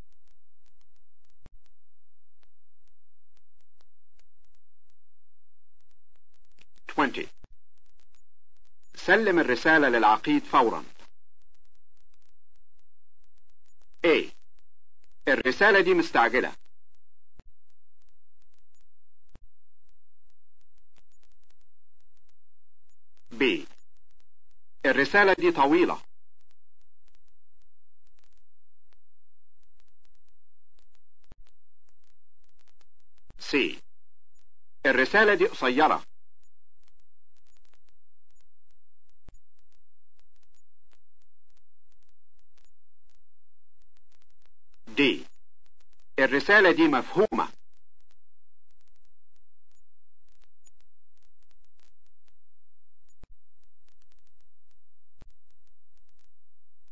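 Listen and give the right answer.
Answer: A: الرسالة دي مستعجلة.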